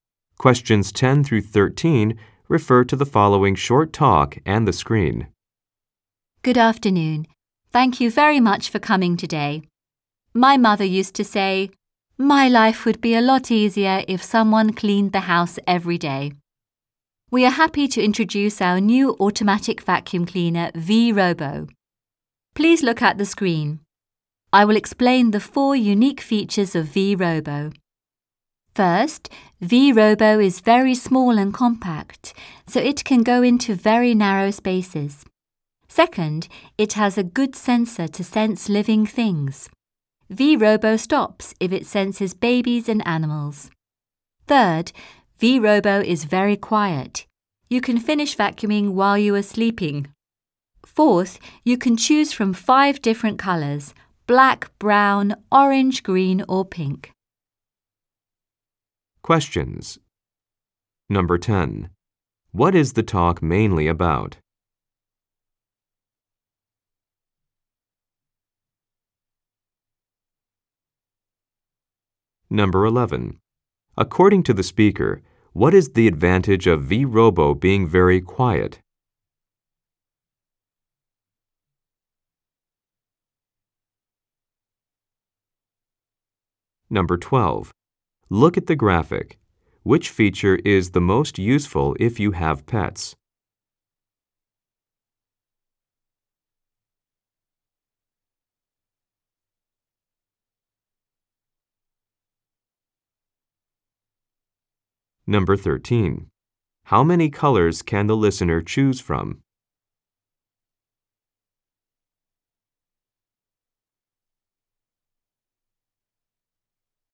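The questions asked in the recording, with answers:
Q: What is the talk mainly about?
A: A new automatic vacuum cleaner, V-Robo

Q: According to the speaker, what is the advantage of V-Robo being very quiet?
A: You can finish vacuuming while you are sleeping

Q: How many colors can the listener choose from?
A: Five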